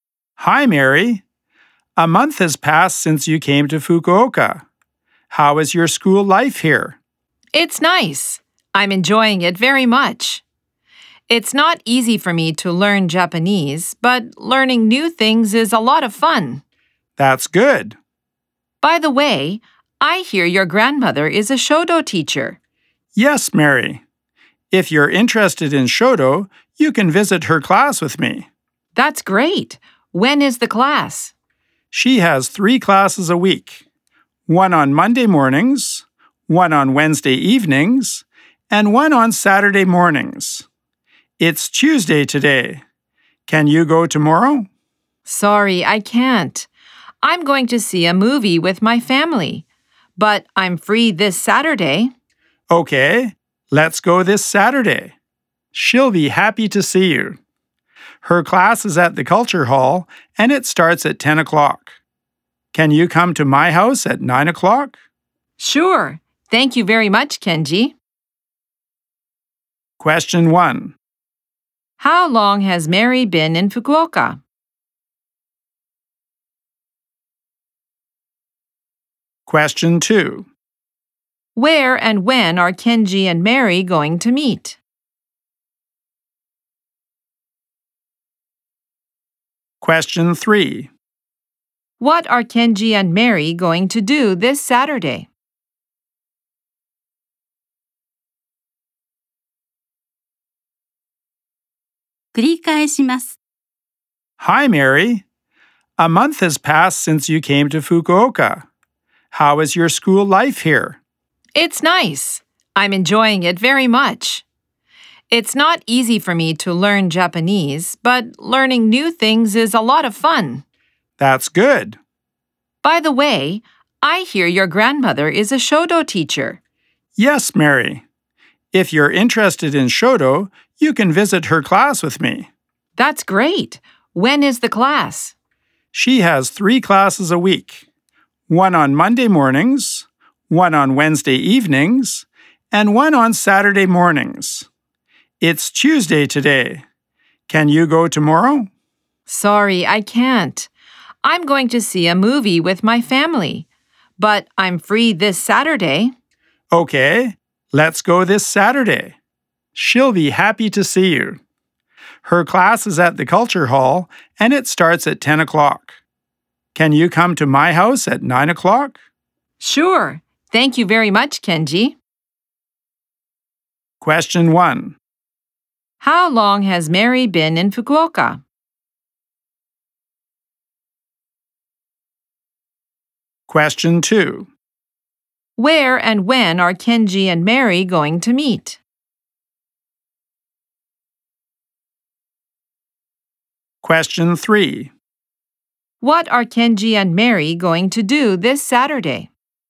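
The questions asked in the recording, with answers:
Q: How long has Mary been in Fukuoka?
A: For a month.

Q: Where and when are Kenji and Mary going to meet?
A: At Kenji's house at 9 o'clock this Saturday.

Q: What are Kenji and Mary going to do this Saturday?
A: Visit Kenji's grandmother's shodo class.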